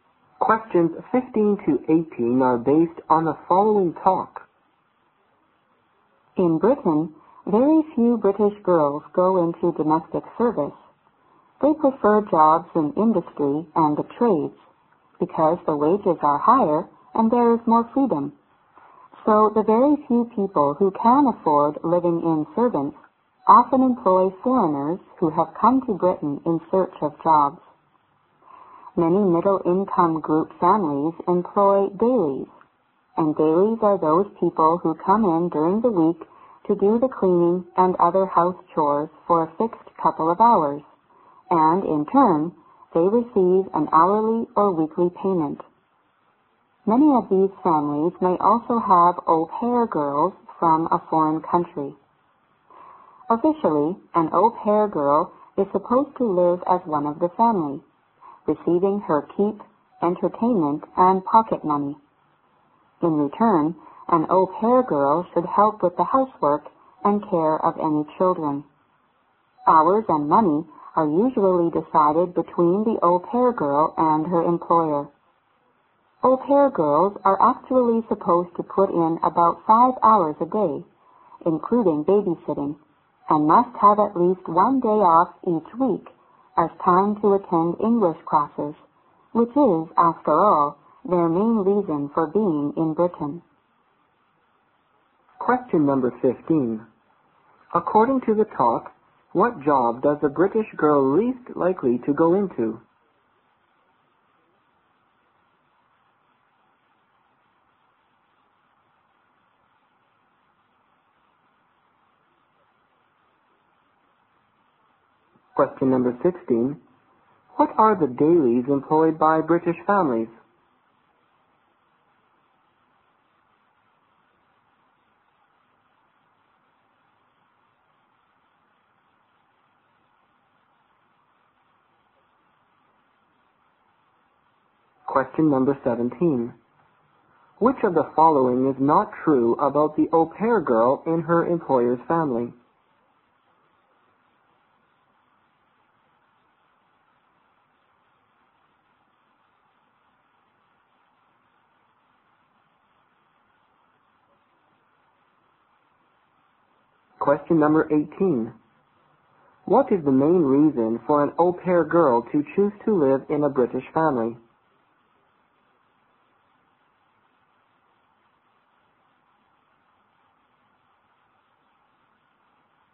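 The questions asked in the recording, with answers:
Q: According to the talk, what job does a British girl least likely to go into?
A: Domestic service

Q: What are the dailies employed by British families?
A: People who come in during the week for a few hours to clean and do house chores for hourly or weekly pay

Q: What is the main reason for an au pair girl to choose to live in a British family?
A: To attend English classes (learn English)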